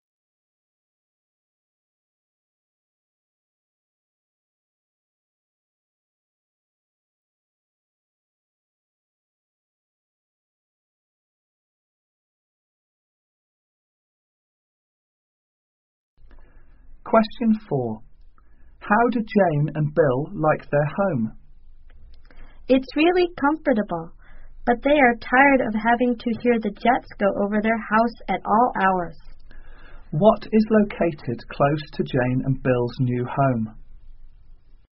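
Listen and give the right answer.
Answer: An airport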